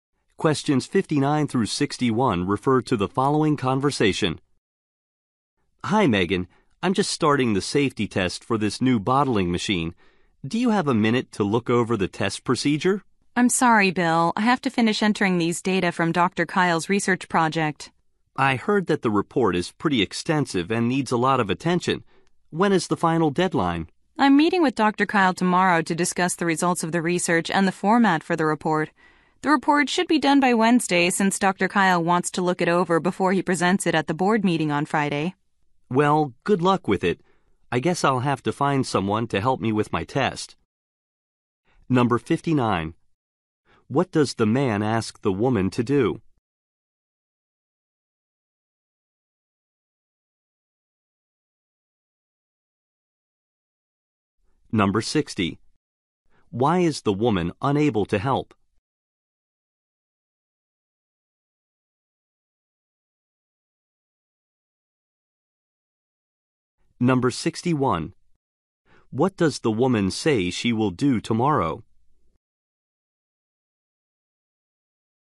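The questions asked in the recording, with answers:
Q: What does the man ask the woman to do?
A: Look over the test procedure

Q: Why is the woman unable to help?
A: She has to finish entering research data

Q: What does the woman say she will do tomorrow?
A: Meet with Dr. Kyle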